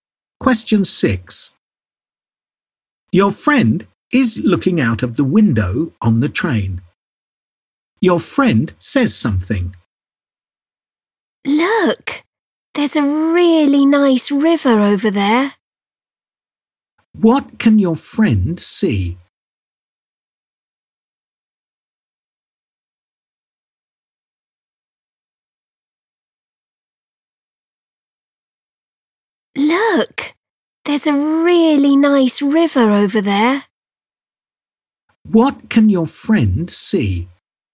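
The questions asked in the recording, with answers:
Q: What can your friend see?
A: A river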